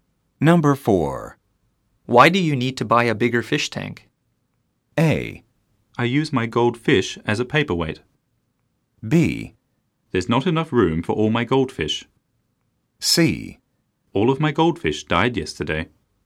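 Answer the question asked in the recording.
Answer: B: There's not enough room for all my goldfish.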